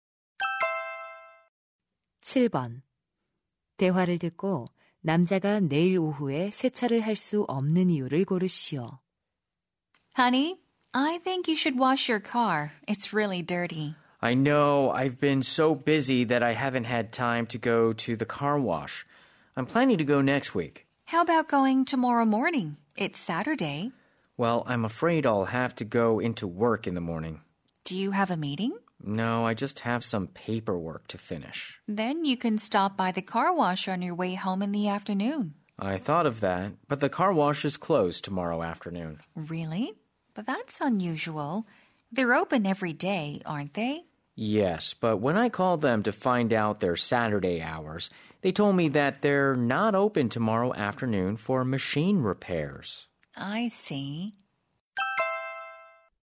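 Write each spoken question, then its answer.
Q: 대화를 듣고 남자가 내일 오후에 세차를 할 수 없는 이유를 고르시오.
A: 세차장이 기계 수리로 내일 오후에 문을 닫아서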